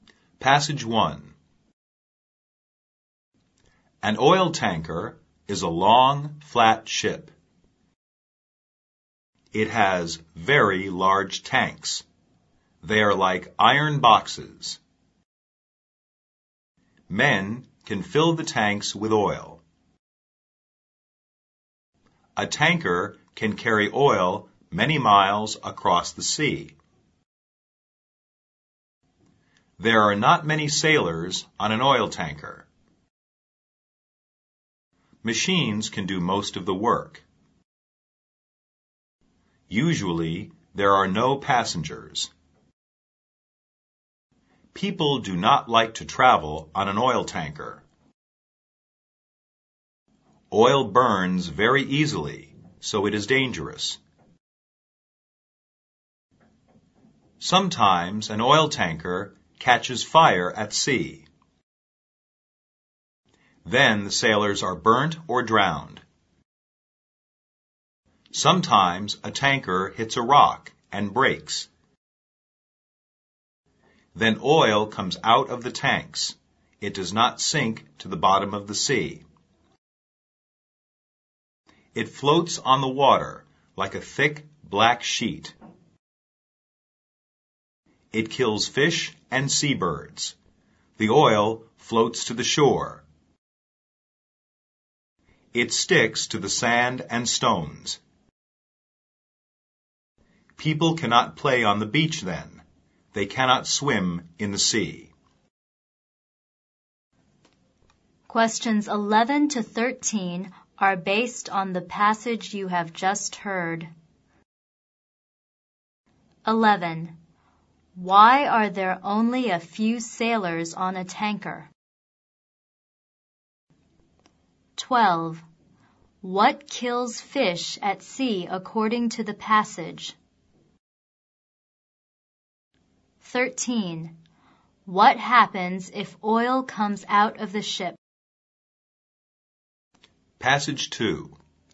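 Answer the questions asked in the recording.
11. Machines do most of the work.
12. Oil floating on the water.
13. It floats on the water, kills fish and seabirds, and spoils the beaches.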